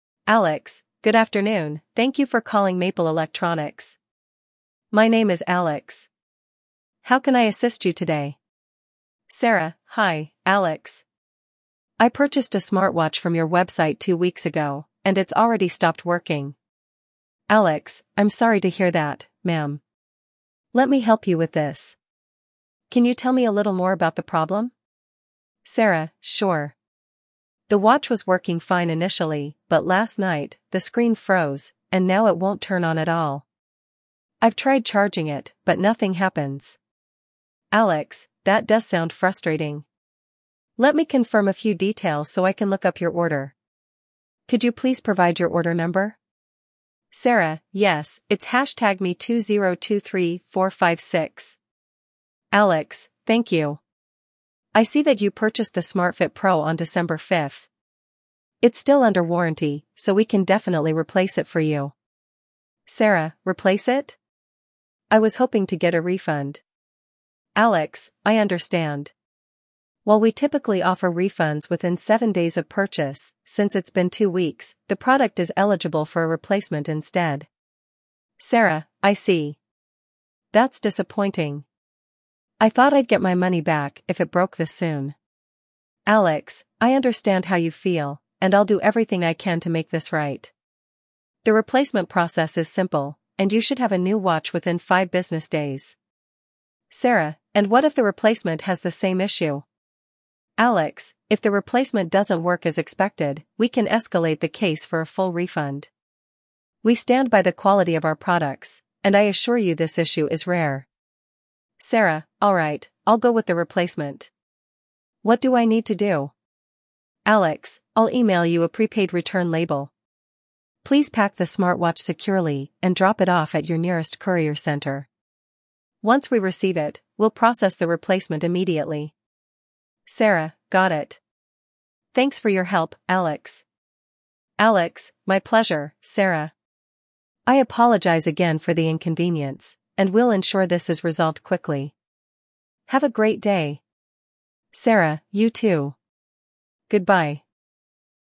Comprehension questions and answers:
Part 1: Multiple Choice (Choose the correct answer)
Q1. The order number provided by the customer is __________.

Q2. The watch was purchased on __________.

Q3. The customer must drop off the smartwatch at the nearest __________ center.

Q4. Alex emails the customer a __________ label for the return.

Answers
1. #ME2023456
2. December 5th
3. courier
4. prepaid return

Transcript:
Alex: Good afternoon, thank you for calling Maple Electronics. My name is Alex. How can I assist you today?
Sarah: Hi, Alex. I purchased a smartwatch from your website two weeks ago, and it's already stopped working.
Alex: I'm sorry to hear that, ma'am. Let me help you with this. Can you tell me a little more about the problem?
Sarah: Sure. The watch was working fine initially, but last night, the screen froze, and now it won't turn on at all. I've tried charging it, but nothing happens.
Alex: That does sound frustrating. Let me confirm a few details so I can look up your order. Could you please provide your order number?
Sarah: Yes, it's #ME2023456.
Alex: Thank you. I see that you purchased the SmartFit Pro on December 5th. It's still under warranty, so we can definitely replace it for you.
Sarah: Replace it? I was hoping to get a refund.
Alex: I understand. While we typically offer refunds within 7 days of purchase, since it's been two weeks, the product is eligible for a replacement instead.
Sarah: I see. That's disappointing. I thought I'd get my money back if it broke this soon.
Alex: I understand how you feel, and I'll do everything I can to make this right. The replacement process is simple, and you should have a new watch within 5 business days.
Sarah: And what if the replacement has the same issue?
Alex: If the replacement doesn't work as expected, we can escalate the case for a full refund. We stand by the quality of our products, and I assure you this issue is rare.
Sarah: Alright, I'll go with the replacement. What do I need to do?
Alex: I'll email you a prepaid return label. Please pack the smartwatch securely and drop it off at your nearest courier center. Once we receive it, we'll process the replacement immediately.
Sarah: Got it. Thanks for your help, Alex.
Alex: My pleasure, Sarah. I apologize again for the inconvenience, and we'll ensure this is resolved quickly. Have a great day!
Sarah: You too. Goodbye.